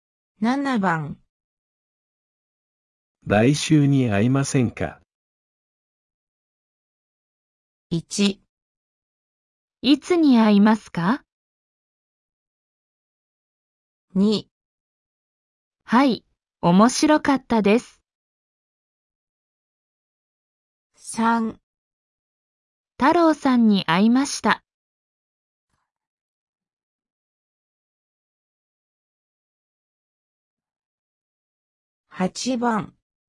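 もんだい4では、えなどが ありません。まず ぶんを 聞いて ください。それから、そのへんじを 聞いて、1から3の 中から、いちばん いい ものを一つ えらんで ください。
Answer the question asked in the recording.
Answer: 1

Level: N4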